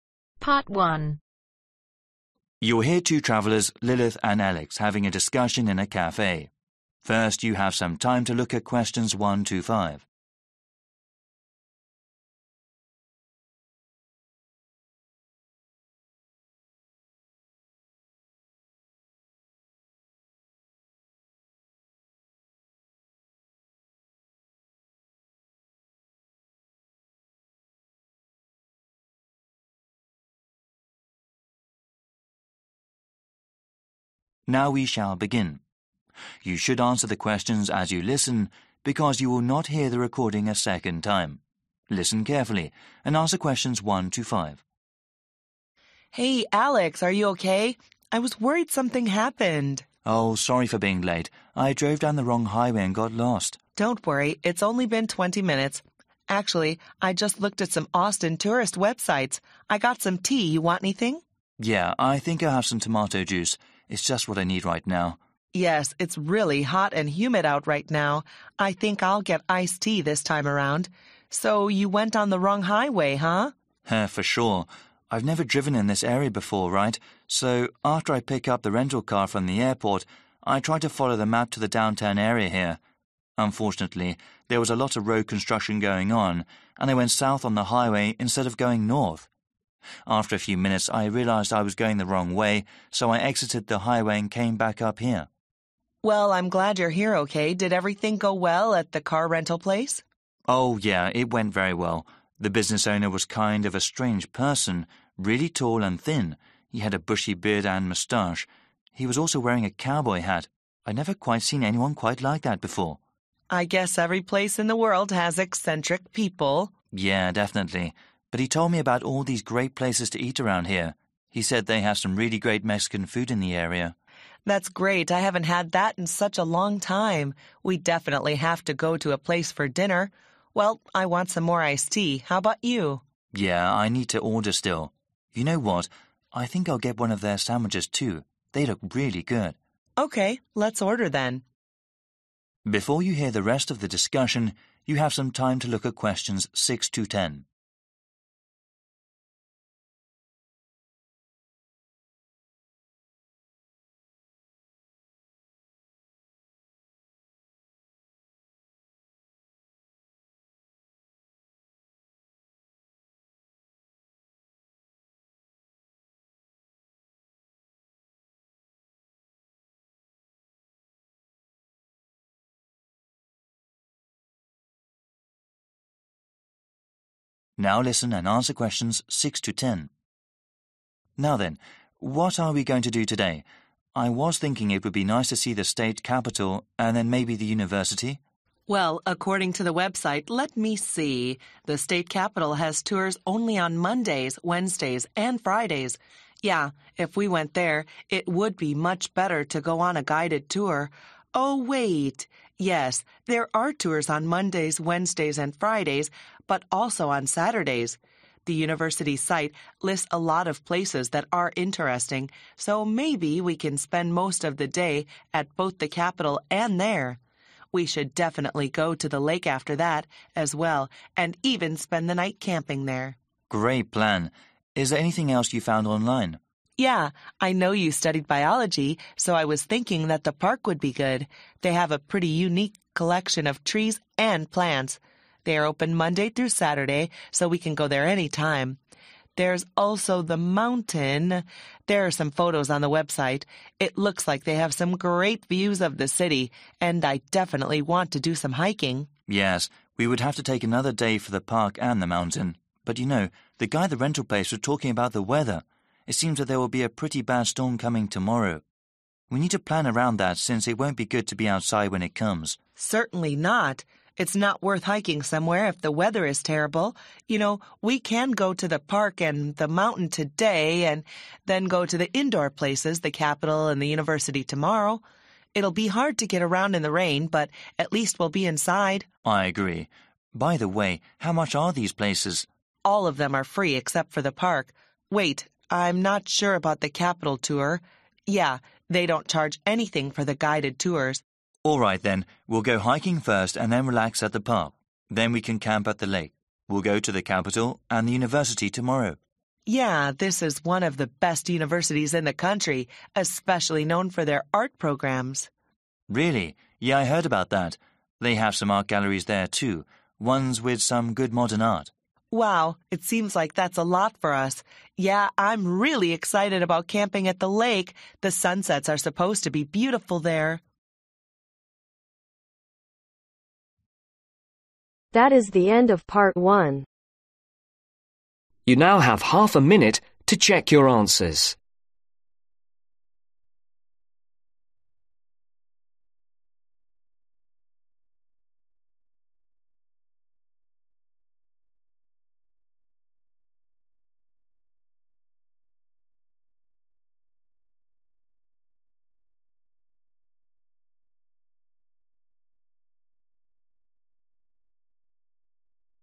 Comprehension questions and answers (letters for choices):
Choose the correct letter, A , B or C.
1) What kind of drink does Alex want to have ?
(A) coffee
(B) orange juice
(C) tomato juice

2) What made Alex lost when he was driving in the car ?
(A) There was road construction.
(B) There was bad weather.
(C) The map he had was wrong.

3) Alex said the car rental business owner was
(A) really friendly.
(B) a weird person.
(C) not helpful.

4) What did the business owner talk about the Alex ?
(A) cars and trucks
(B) the local history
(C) some tasty local restaurants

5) What else does Alex also decided to order ?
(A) a sandwich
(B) a breakfast meal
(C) some Mexican food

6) Tours are available Mondays, Wednesdays, Fridays, and Saturdays at the state .......... .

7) It is possible to camp at the ............ overnight.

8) There is a unique collection of plants at the .............. , which is open Monday through Saturday.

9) Alex and Lilith want to visit indoor places because of a bad ............... that is forecasted for tomorrow.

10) At the University, Alex wants to see some good .............. art at the galleries.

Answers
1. C
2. A
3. B
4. C
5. A
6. Capital
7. lake
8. park
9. storm
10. modern